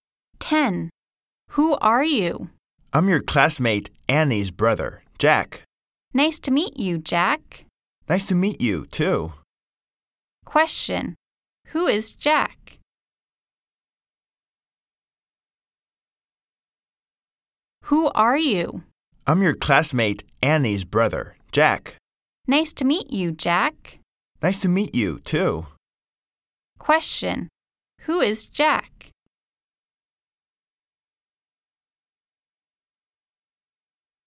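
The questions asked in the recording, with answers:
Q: Question. Who is Jack?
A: Annie's brother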